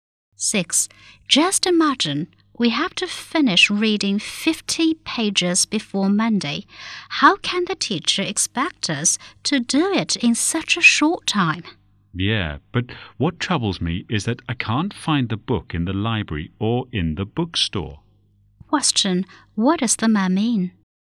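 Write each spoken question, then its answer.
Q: What does the man mean?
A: He can't find the book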